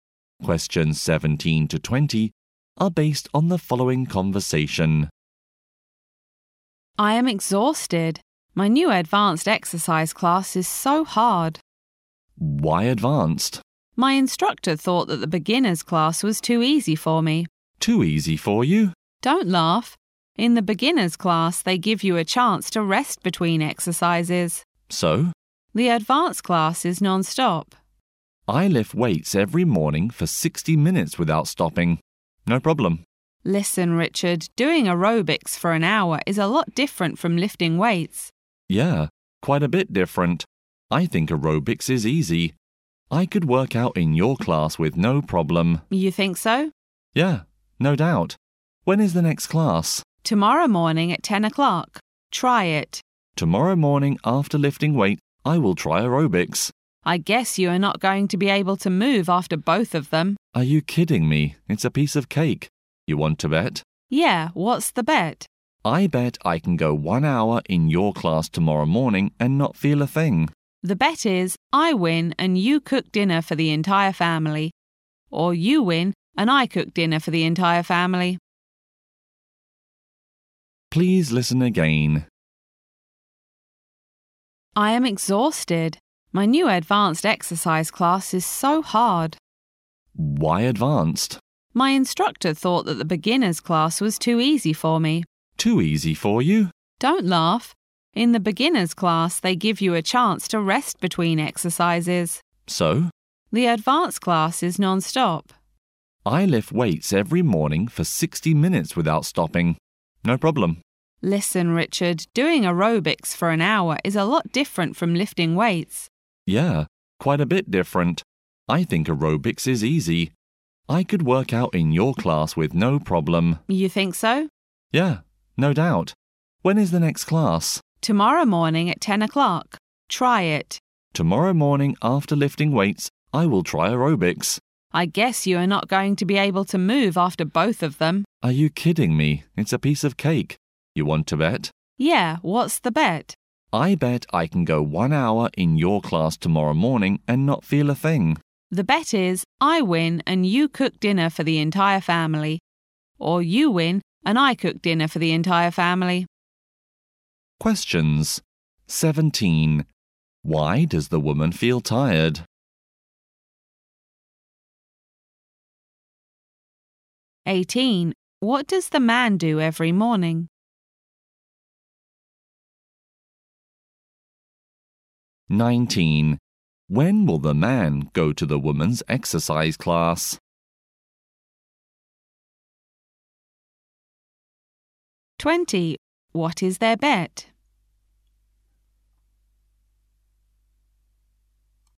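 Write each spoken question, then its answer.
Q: Why does the woman feel tired?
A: Her advanced exercise class is non-stop

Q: What does the man do every morning?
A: Lifts weights for 60 minutes

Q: When will the man go to the woman's exercise class?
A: Tomorrow morning at 10

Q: What is their bet?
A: The loser cooks dinner for the whole family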